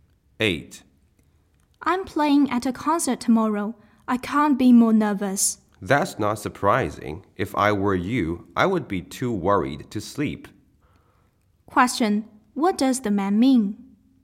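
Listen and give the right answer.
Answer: It's natural for the woman to be nervous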